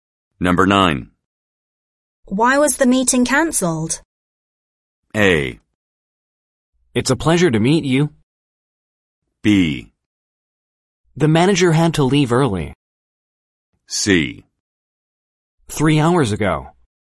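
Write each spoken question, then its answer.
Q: Why was the meeting cancelled?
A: B: The manager had to leave early.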